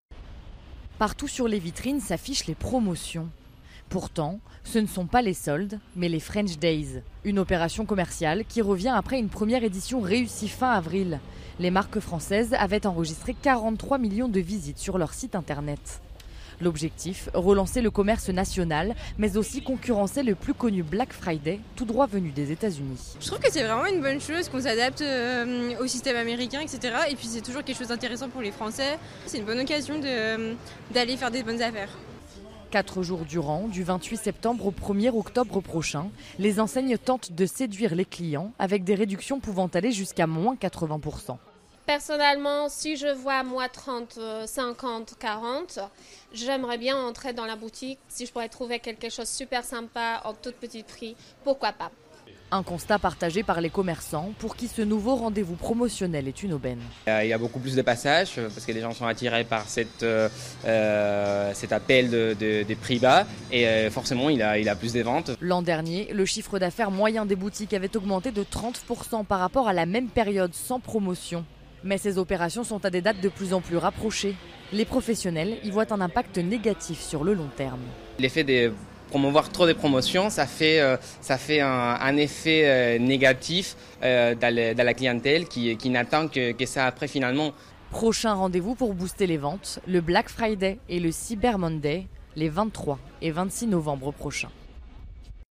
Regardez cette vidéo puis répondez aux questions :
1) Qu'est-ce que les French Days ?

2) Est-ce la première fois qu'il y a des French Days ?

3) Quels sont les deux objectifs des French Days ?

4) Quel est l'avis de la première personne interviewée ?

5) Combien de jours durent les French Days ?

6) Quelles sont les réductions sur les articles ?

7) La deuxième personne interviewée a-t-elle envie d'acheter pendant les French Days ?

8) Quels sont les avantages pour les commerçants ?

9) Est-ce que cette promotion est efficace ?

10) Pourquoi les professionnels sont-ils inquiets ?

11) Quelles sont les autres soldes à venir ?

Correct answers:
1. Ce sont des promotions commerciales (soldes).
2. Non, c'est la deuxième édition (fois).
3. Relancer le commerce national et concurrencer le Black Friday.
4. Elle est favorable et ça permet de faire de bonnes affaires.
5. 4 jours (du 28 septembre au 1er octobre).
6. Ça peut aller jusqu'à -80%.
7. Oui, si le prix est intéressant alors pourquoi pas.
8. Il y a plus de passage et donc plus de ventes.
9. Oui, l'année dernière les ventes avaient augmentées de 30%.
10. Les dates des French Days sont trop proches de celles des autres soldes. S'il y a trop de promotions, les clients n'attendent plus que ça.
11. Le Black Friday (23 novembre) et le Cyber Monday (26 novembre).

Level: Niveaux : B1/B2